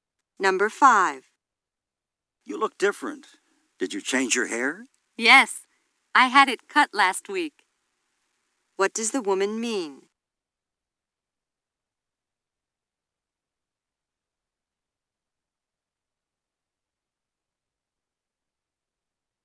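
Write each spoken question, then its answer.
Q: What does the woman mean?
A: She got a haircut last week.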